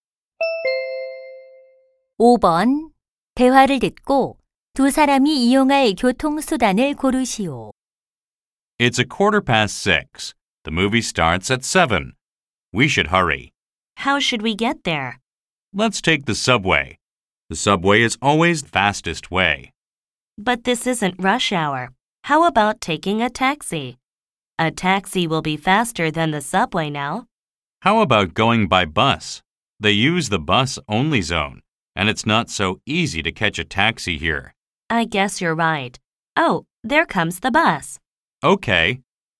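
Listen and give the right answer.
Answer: 버스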